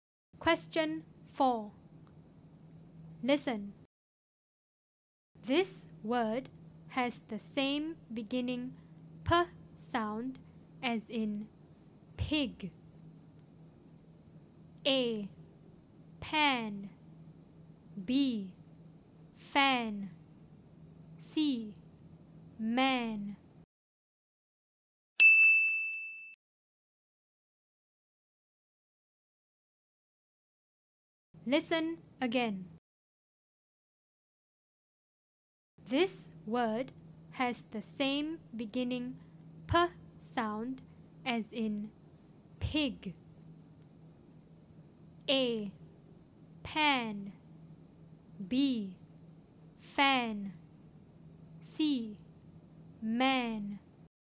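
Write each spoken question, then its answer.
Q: This word has the same beginning p sound as in pig.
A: A: Pan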